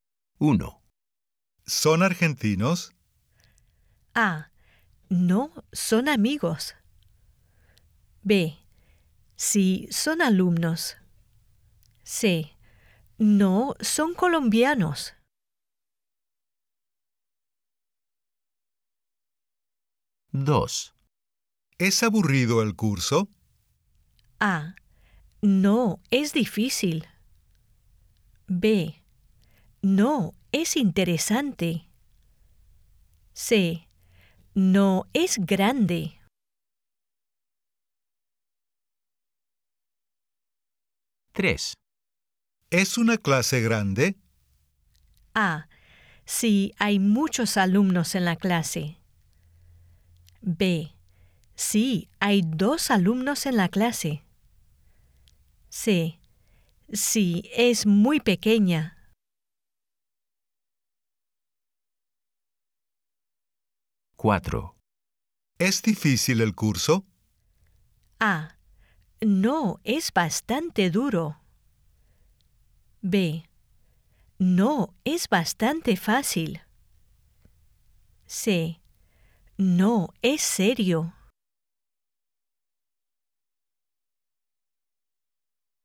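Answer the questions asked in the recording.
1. C: No, son colombianos.
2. B: No, es interesante.
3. A: Sí, hay muchos alumnos en la clase.
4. B: No, es bastante fácil.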